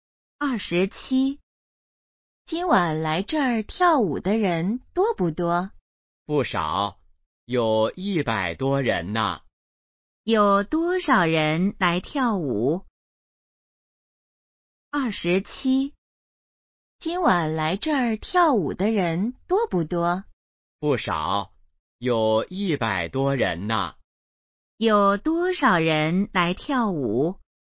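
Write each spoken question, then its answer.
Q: 有多少人来跳舞?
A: 100多人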